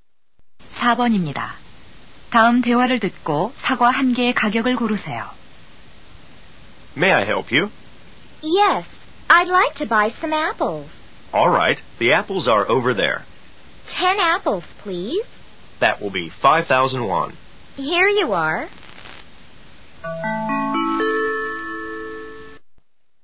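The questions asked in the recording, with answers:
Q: 다음 대화를 듣고 사과 한 개의 가격을 고르세요.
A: 500원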